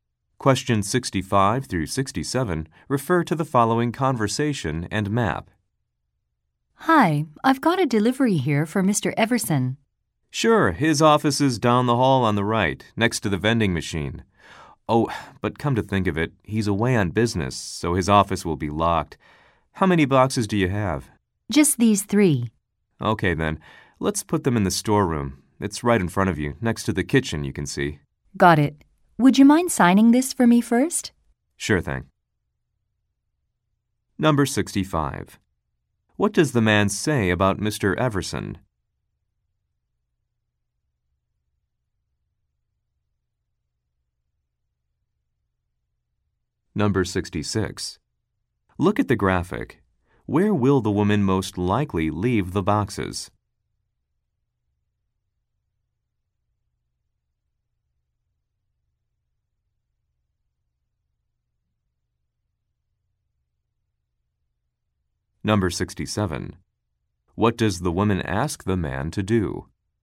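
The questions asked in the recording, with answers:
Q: What does the man say about Mr.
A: He is away on business

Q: What does the woman ask the man to do?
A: Sign for the delivery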